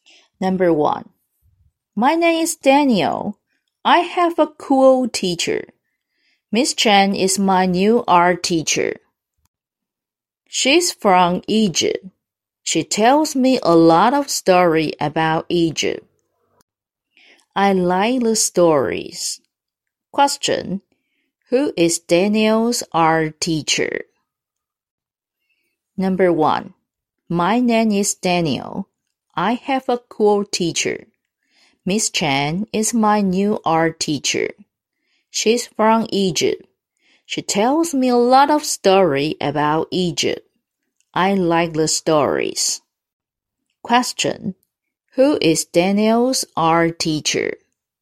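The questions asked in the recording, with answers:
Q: Who is Daniel's art teacher?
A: Miss Chen.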